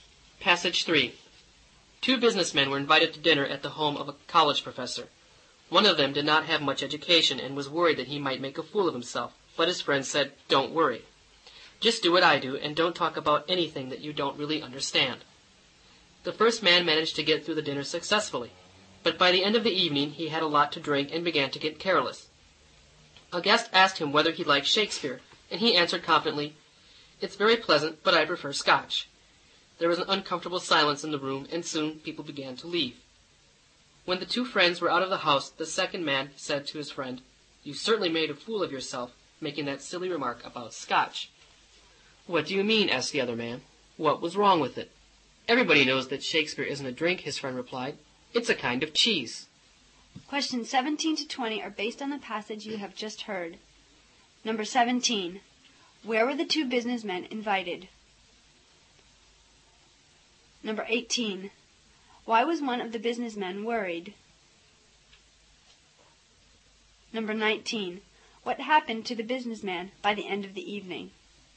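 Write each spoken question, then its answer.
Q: Where were the two businessmen invited?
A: To dinner at a college professor's home

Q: Why was one of the businessmen worried?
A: He didn't have much education and feared making a fool of himself

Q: What happened to the businessman by the end of the evening?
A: He had drunk a lot and became careless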